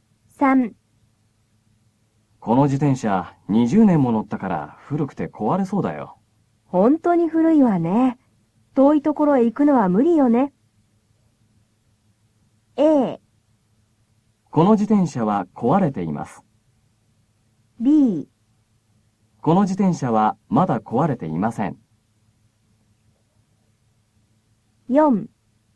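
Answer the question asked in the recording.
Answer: B: この自転車はまだ壊れていません。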